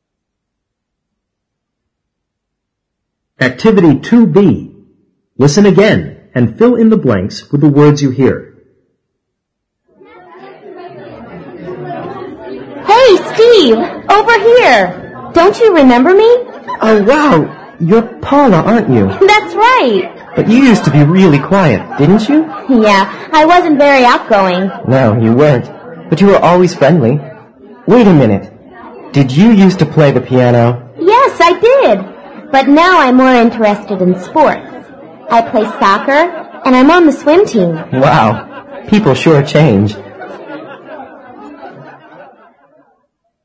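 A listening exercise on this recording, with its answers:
2b Listen again and fill in the blanks with the words you hear.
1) You used to be really_________ , didn't you?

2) Yeah, I wasn't very ________.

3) No, you weren't .But you were always.________. wait a minute! Did you use to play the piano?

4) Yes, I did. But now I'm more interested in ________. I play soccer and I'm on the swim team.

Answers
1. quiet
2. outgoing
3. friendly
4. sports

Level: 八年级上册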